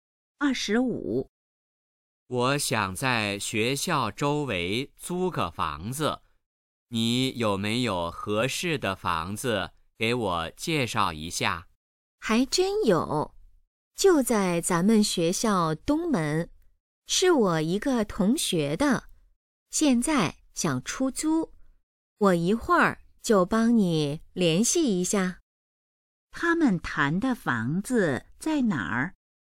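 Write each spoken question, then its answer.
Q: 他们谈的房子在哪儿?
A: 学校东门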